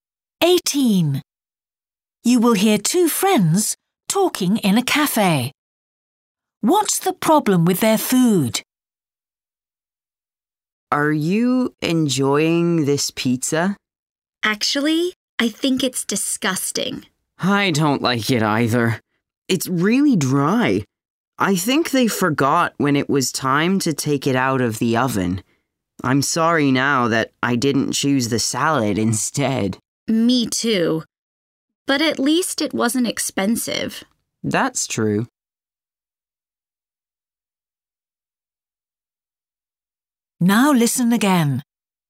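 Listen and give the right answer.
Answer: The pizza is too dry (cooked too long)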